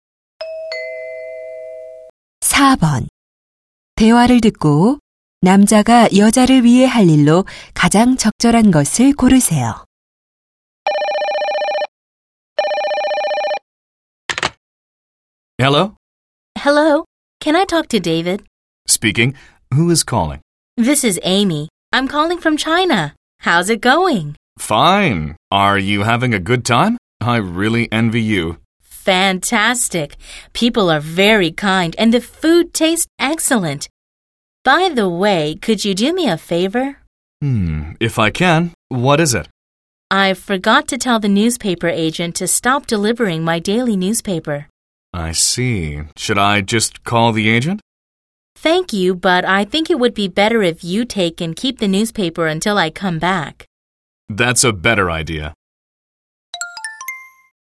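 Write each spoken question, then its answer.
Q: 대화를 듣고 남자가 여자를 위해 할 일로 가장 적절한 것을 고르세요.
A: 여자가 돌아올 때까지 신문을 받아 보관하기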